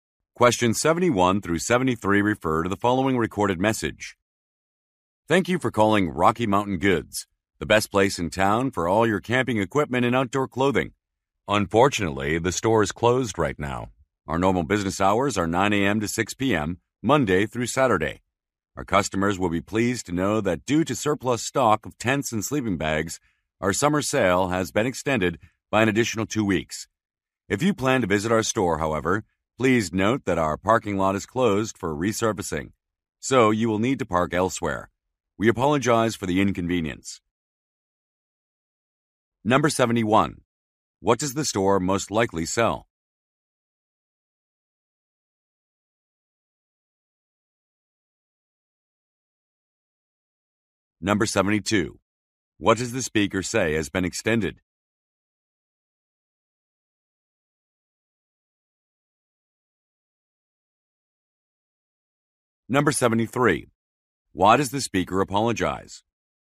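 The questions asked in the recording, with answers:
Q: What does the store most likely sell?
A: Camping equipment and outdoor clothing

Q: What does the speaker say has been extended?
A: The summer sale

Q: Why does the speaker apologize?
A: The parking lot is closed for resurfacing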